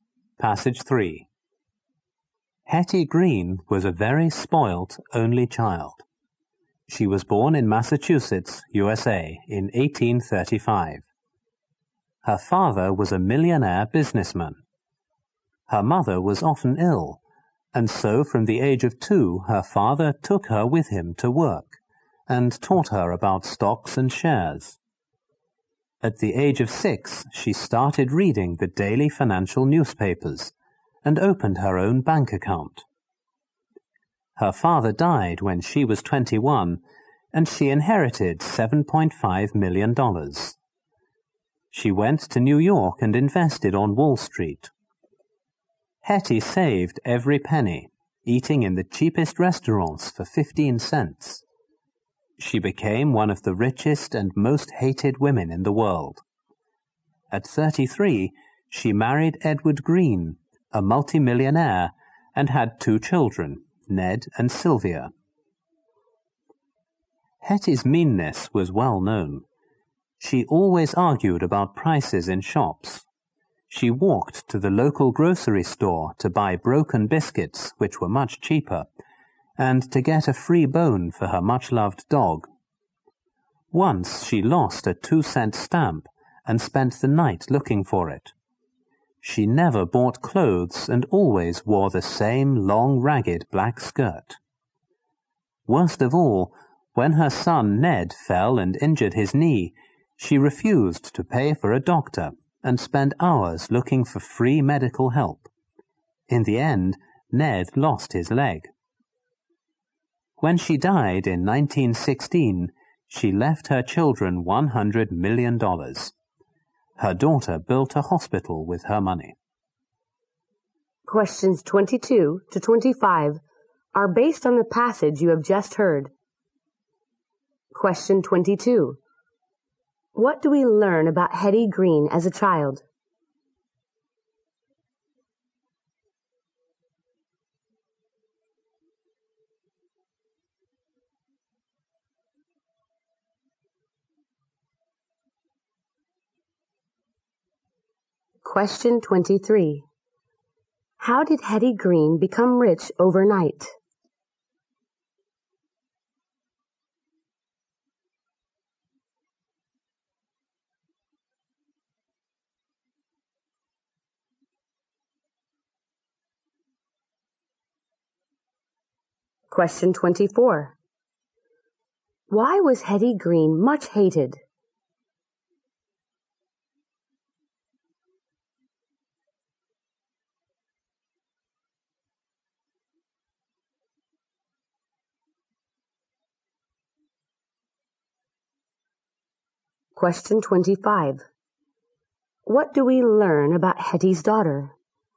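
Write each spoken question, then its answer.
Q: How did Hetty Green become rich overnight?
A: She inherited $7.5 million from her father.

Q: Why was Hetty Green much hated?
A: She was extremely mean.

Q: What do we learn about Hetty's daughter?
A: She built a hospital with her mother's money.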